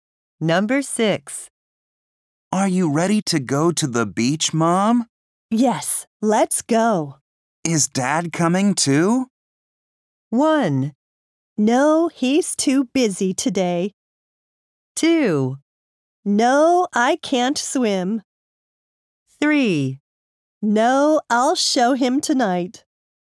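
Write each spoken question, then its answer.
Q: Is Dad coming too?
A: 1: No, he's too busy today.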